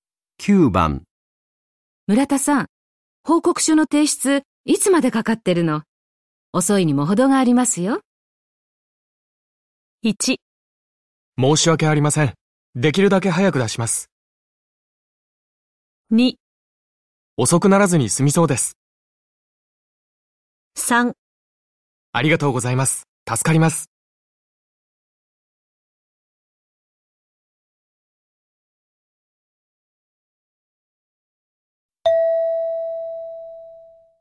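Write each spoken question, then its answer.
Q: 村田さん、報告書の提出、いつまでかかってるの?遅いにも程がありますよ。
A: 1: 申し訳ありません。できるだけ早く出します。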